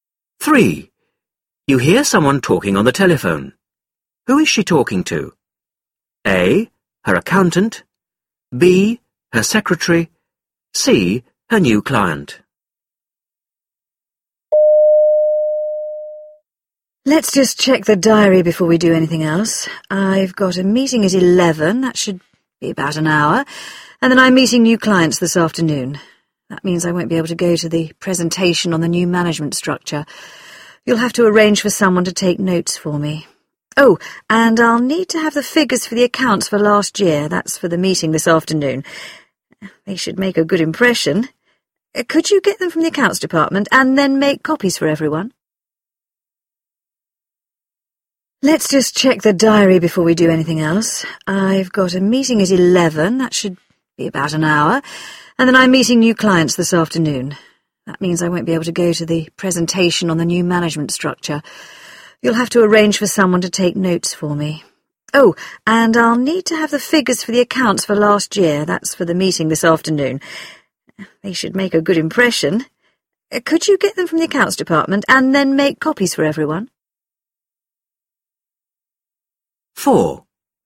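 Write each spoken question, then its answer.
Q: Who is she talking to?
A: B: Her secretary.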